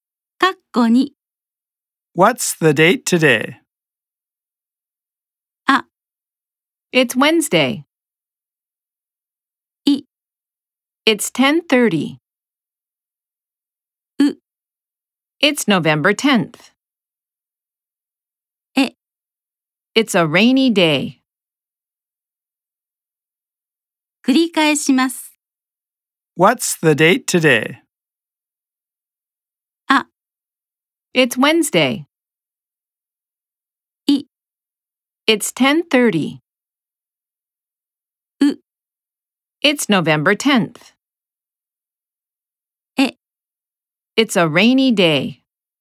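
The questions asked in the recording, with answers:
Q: What's the date today?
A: U: It's November 10th.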